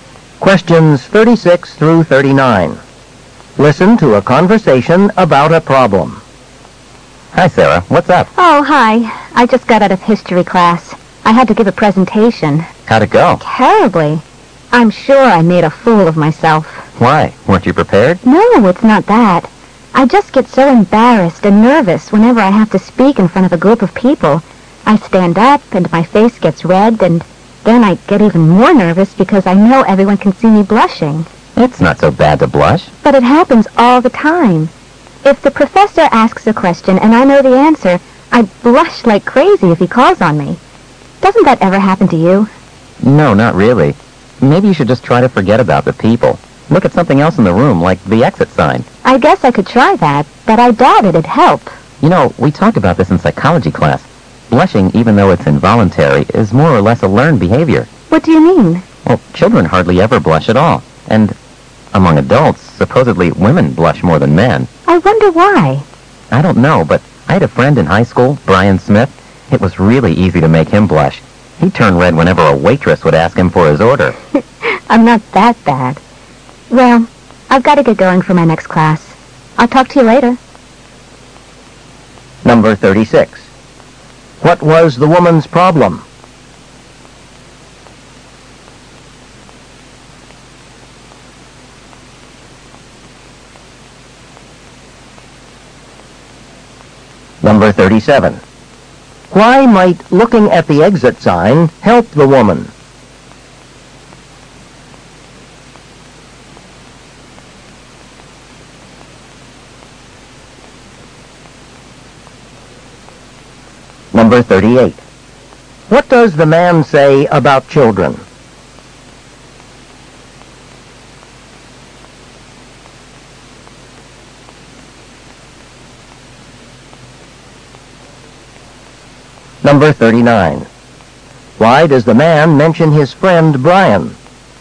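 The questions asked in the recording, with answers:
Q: What was the woman's problem?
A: She blushes when speaking in front of people

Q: Why might looking at the exit sign help the woman?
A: It would help her forget about the people

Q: What does the man say about children?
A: They hardly ever blush

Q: Why does the man mention his friend Brian?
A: As an example of someone who blushed easily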